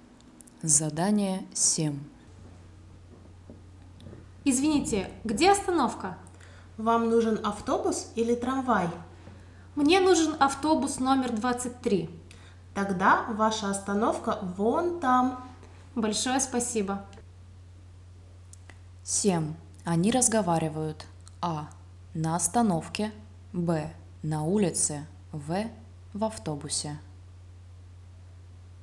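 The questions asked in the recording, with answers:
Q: Они разговаривают. А. На остановке. Б. На улице. В. В автобусе.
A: Б: на улице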